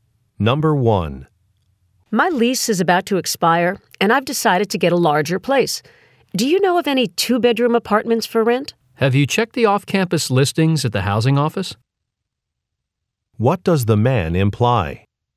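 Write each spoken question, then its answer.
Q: What does the man imply?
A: The woman should check the off-campus listings at the housing office.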